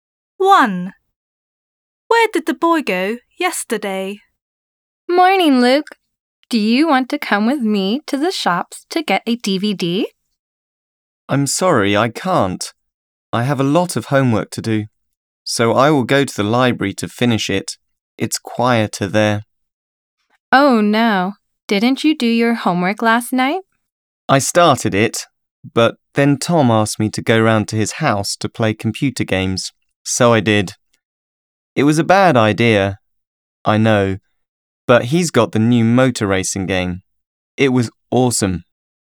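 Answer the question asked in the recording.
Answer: To Tom's house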